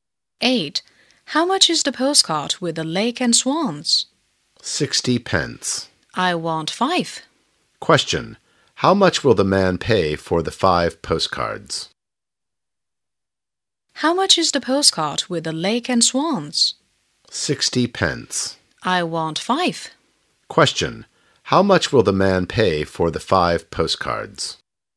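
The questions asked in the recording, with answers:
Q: How much will the man pay for the 5 postcards?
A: 3 pounds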